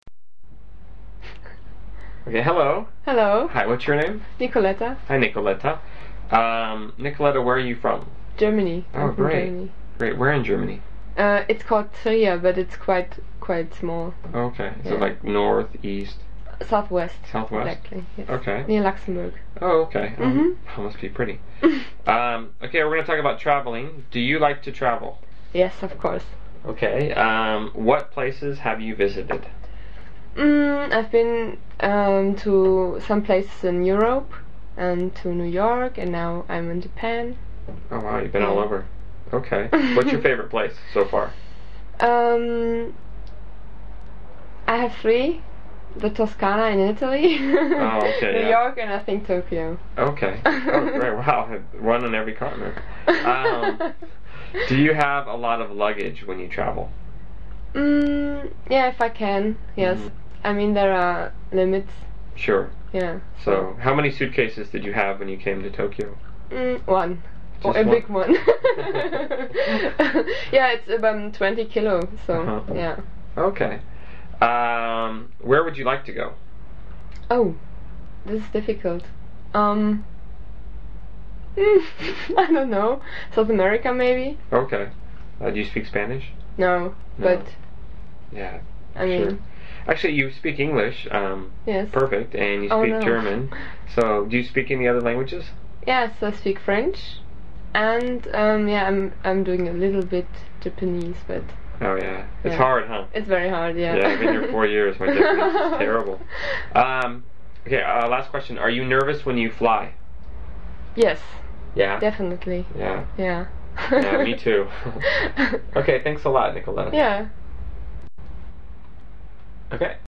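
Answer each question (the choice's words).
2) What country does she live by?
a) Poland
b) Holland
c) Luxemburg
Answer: Luxemburg

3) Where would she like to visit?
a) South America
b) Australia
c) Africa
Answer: South America

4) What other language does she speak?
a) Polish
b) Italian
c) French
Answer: French

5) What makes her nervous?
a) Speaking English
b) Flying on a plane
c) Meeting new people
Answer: Flying on a plane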